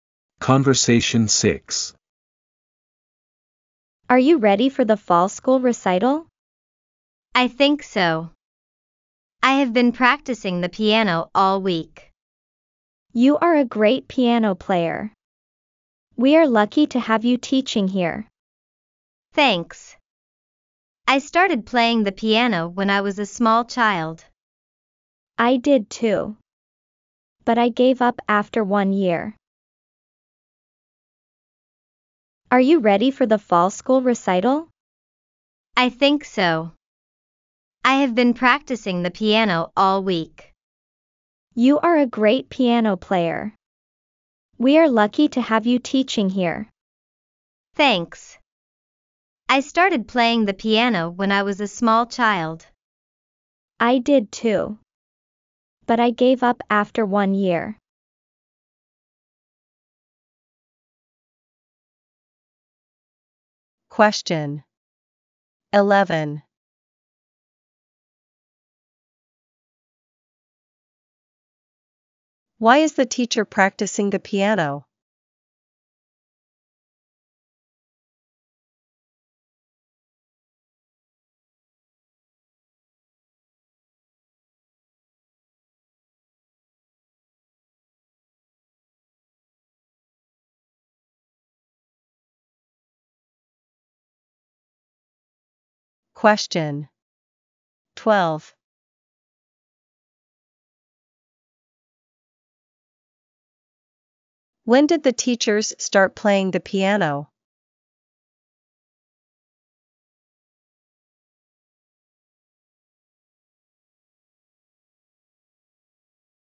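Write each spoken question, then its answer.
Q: Why is the teacher practicing the piano?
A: For the fall school recital

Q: When did the teachers start playing the piano?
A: When they were small children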